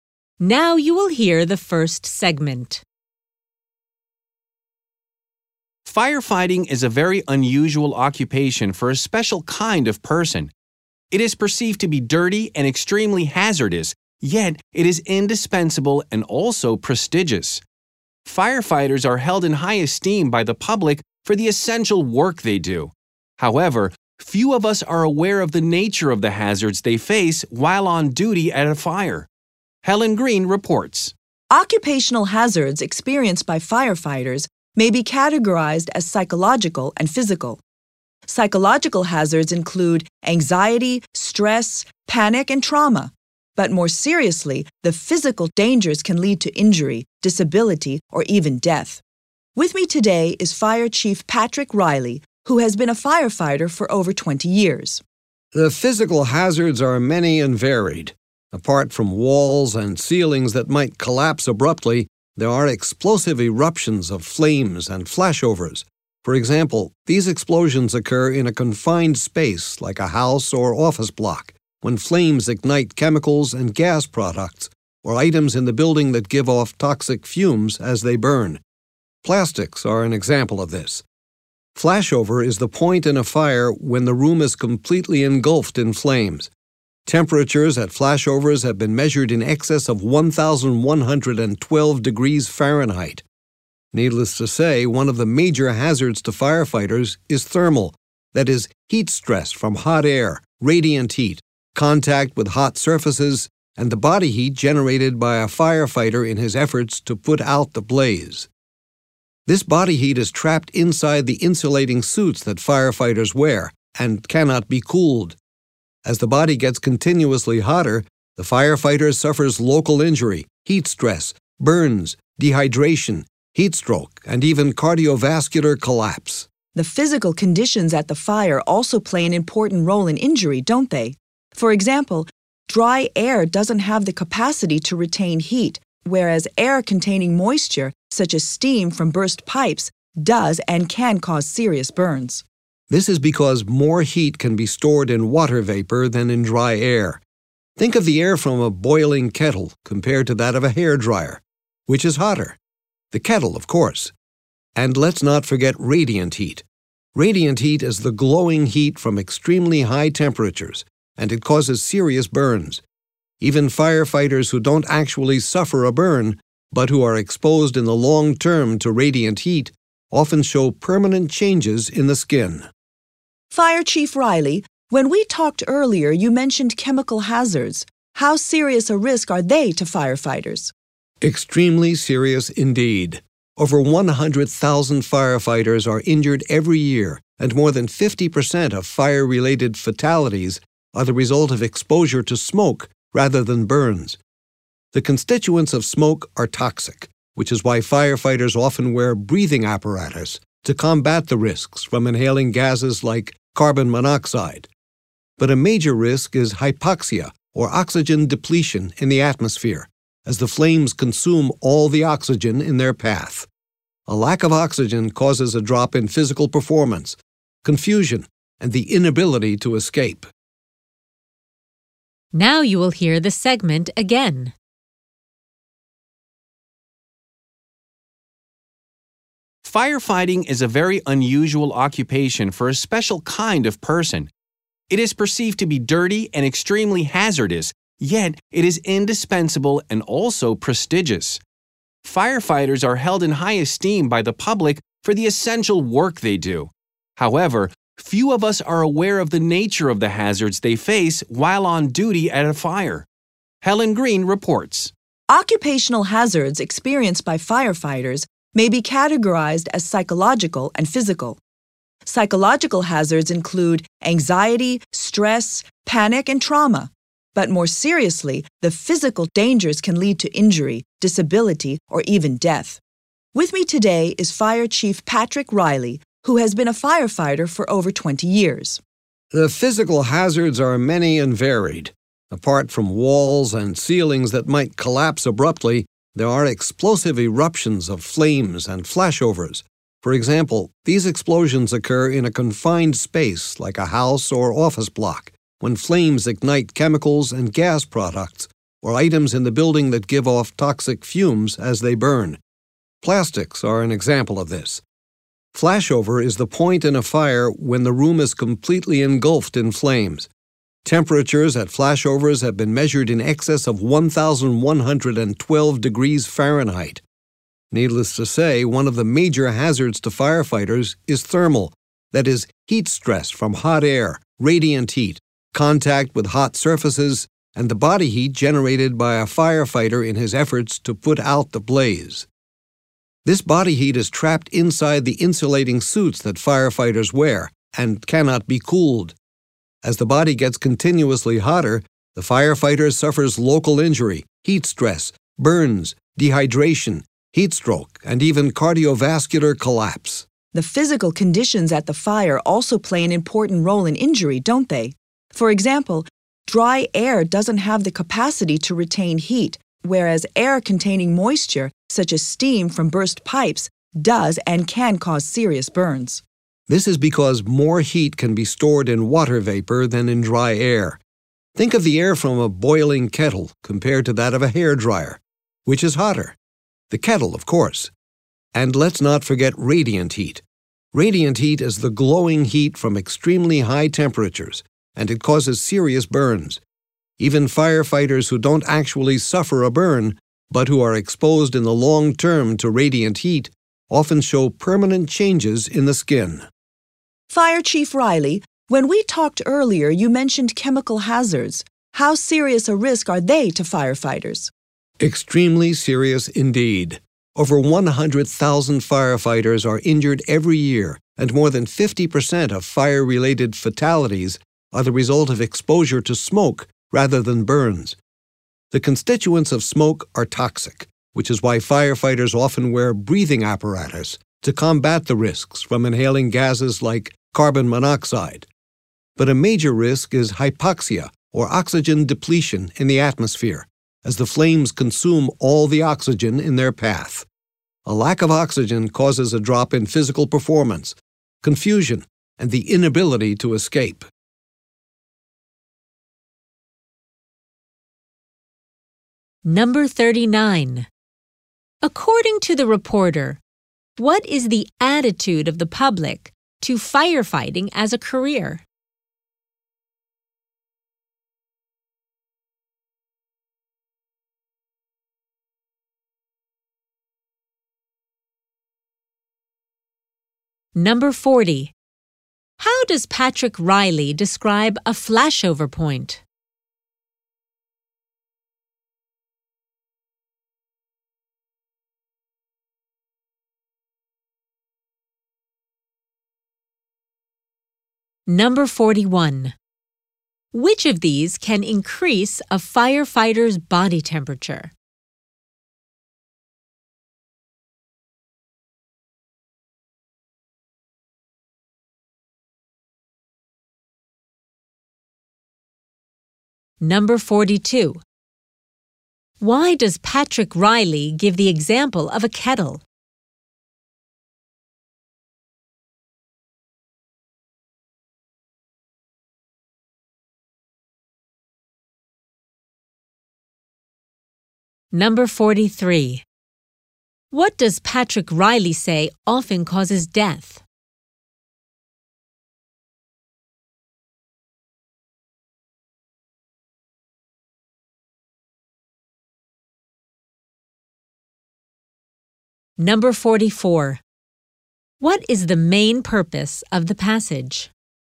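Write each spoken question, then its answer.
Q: According to the reporter, what is the attitude of the public to firefighting as a career?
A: They hold it in high esteem; it is seen as prestigious and indispensable

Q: How does Patrick Riley describe a flashover point?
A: The point when the room is completely engulfed in flames

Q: Why does Patrick Riley give the example of a kettle?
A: To show that moist air (steam) holds more heat than dry air

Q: What does Patrick Riley say often causes death?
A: Exposure to smoke

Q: What is the main purpose of the passage?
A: To inform listeners about the hazards firefighters face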